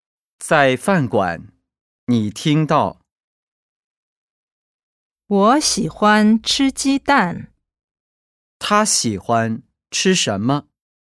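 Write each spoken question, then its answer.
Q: 他喜欢吃什么?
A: 鸡蛋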